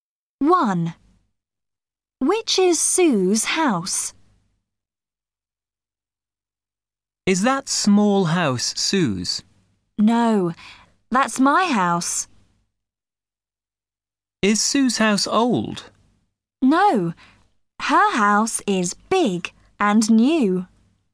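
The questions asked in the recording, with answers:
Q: Which is Sue's house?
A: The big, new house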